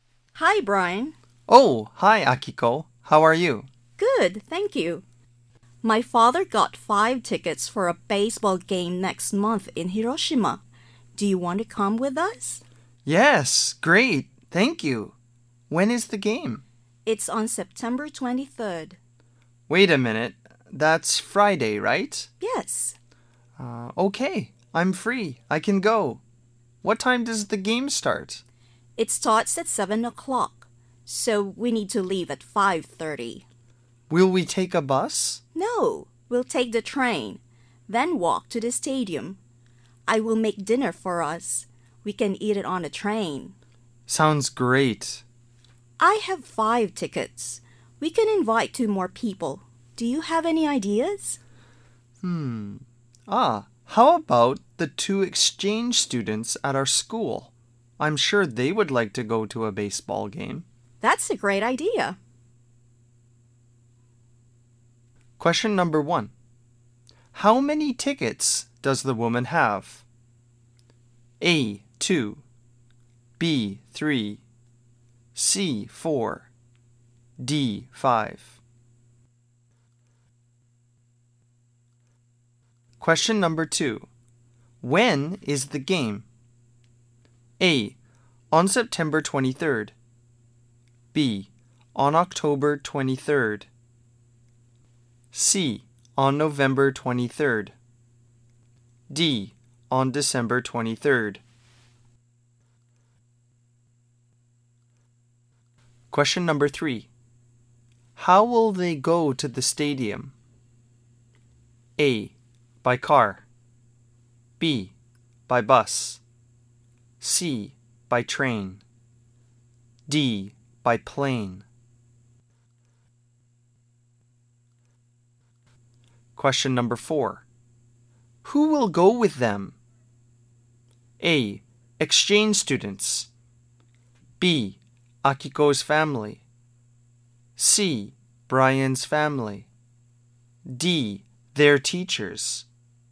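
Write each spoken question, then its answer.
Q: How many tickets does the woman have?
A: D: 5

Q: When is the game?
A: A: on September 23rd

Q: How will they go to the stadium?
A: C: by train

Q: Who will go with them?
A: A: exchange students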